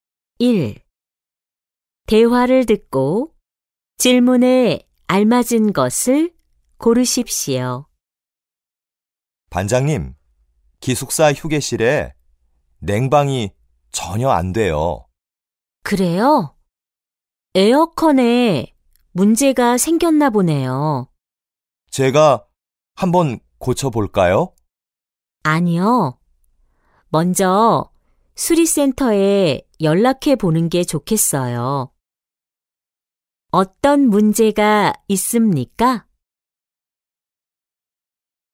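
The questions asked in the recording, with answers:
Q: 어떤 문제가 있습니까?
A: 기숙사 휴게실에 냉방이 안 돼요 (에어컨 고장)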